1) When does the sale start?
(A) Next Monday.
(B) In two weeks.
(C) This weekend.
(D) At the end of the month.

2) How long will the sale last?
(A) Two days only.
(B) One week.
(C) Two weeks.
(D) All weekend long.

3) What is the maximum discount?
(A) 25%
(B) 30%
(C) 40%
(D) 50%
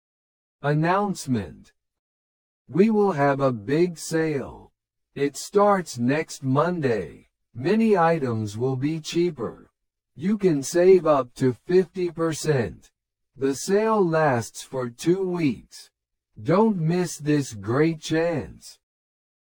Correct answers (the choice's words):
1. Next Monday.
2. Two weeks.
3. 50%

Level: 初級者用